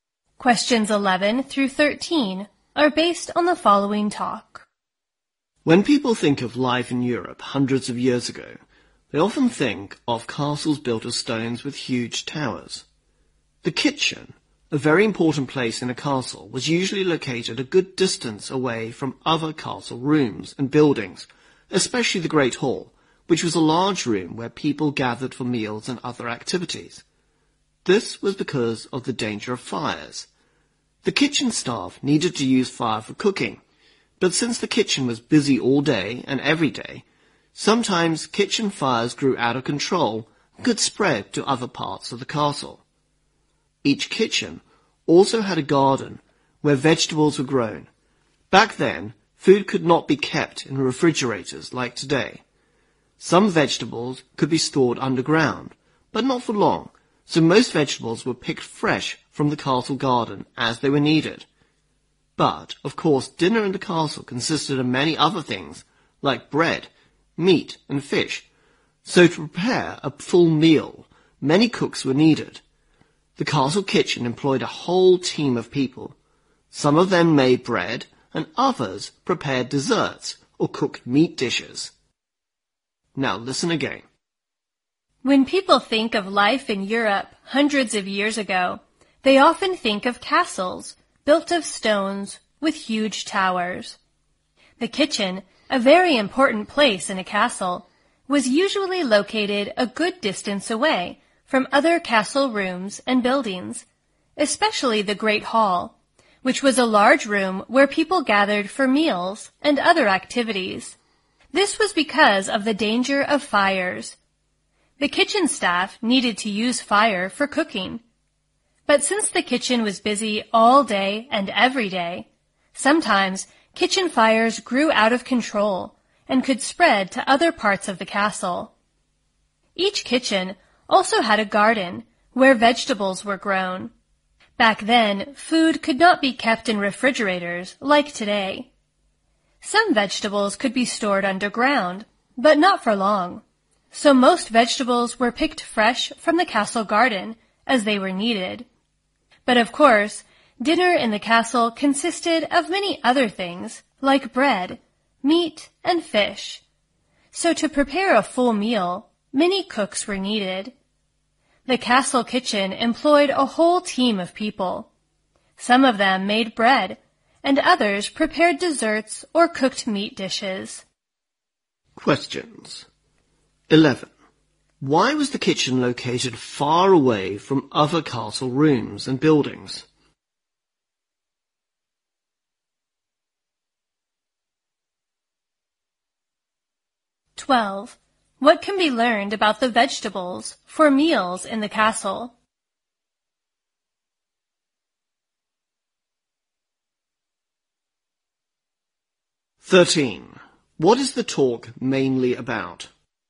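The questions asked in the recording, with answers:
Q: Why was the kitchen located far away from other castle rooms and buildings?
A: Because of the danger of fires

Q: What can be learned about the vegetables for meals in the castle?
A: Most were picked fresh from the castle garden when needed

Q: What is the talk mainly about?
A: Kitchens in European castles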